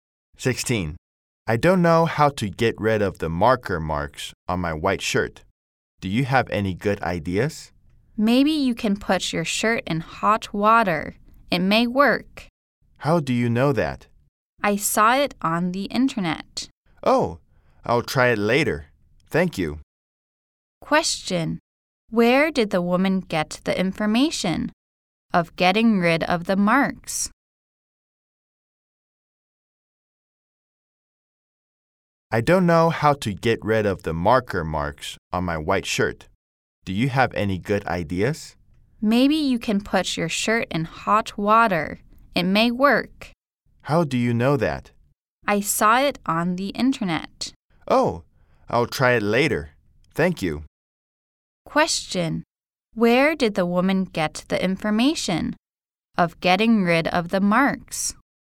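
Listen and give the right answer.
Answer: On the internet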